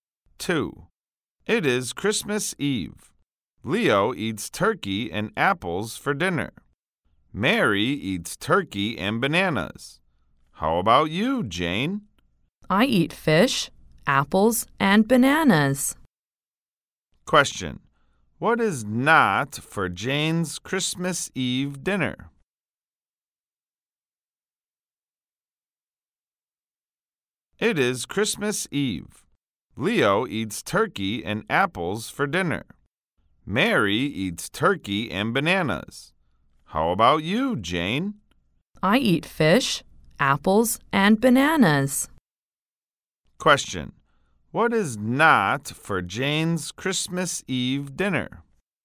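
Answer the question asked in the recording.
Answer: Turkey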